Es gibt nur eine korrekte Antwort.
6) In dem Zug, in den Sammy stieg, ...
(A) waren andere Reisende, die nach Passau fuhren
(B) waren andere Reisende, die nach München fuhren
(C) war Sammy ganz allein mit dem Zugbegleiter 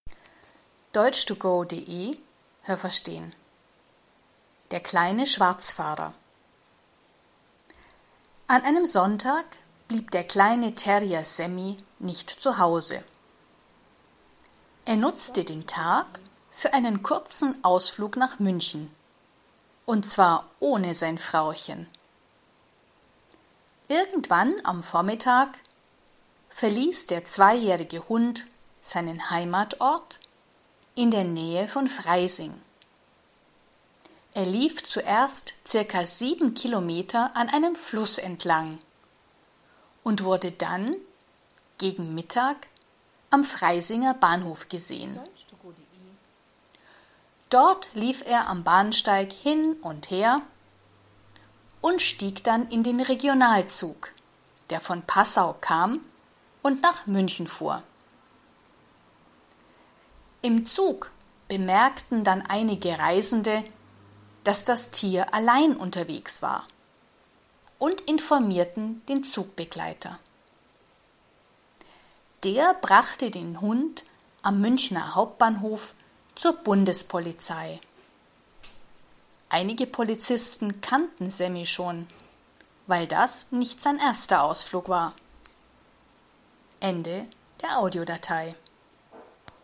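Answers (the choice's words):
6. waren andere Reisende, die nach München fuhren

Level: A2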